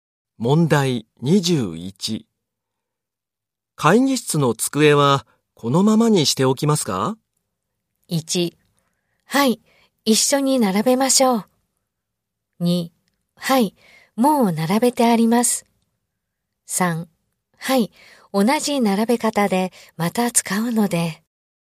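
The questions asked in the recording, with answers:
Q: 会議室の机はこのままにしておきますか?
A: 3: はい、同じ並べ方でまた使うので。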